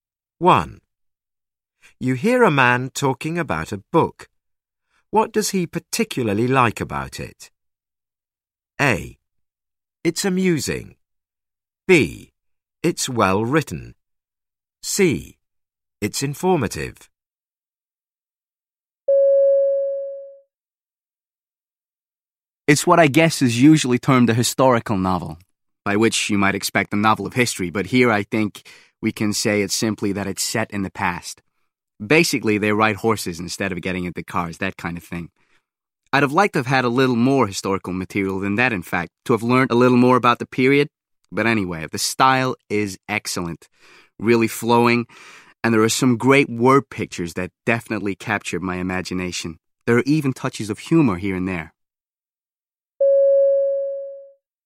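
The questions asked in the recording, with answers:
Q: What does he particularly like about it?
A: B: It's well written.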